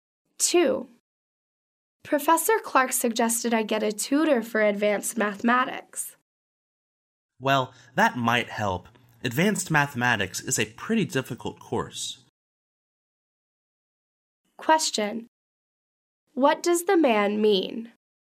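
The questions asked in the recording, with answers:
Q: What does the man mean?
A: Getting a tutor might help because the course is difficult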